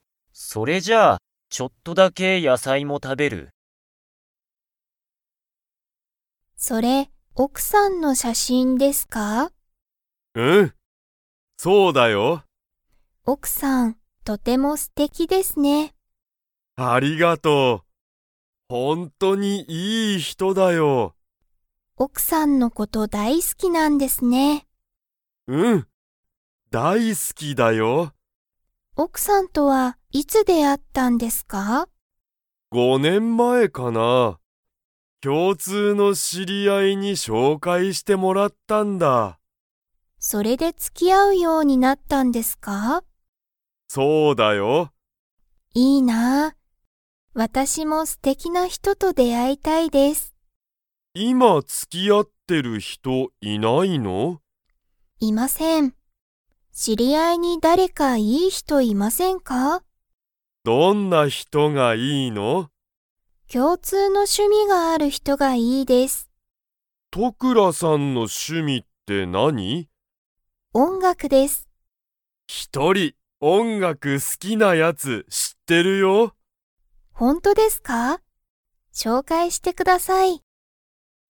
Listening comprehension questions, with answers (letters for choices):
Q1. 鈴木すずきさんは、奥おくさんといつ出会であいましたか?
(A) 3年前さんねんまえ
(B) 4年前よねんまえ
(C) 5年前ごねんまえ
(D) 6年前ろくねんまえ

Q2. 鈴木すずきさんは、音楽おんがくが好すきな人ひとを 。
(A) 知しってる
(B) 知しらない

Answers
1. C
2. A

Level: Level 4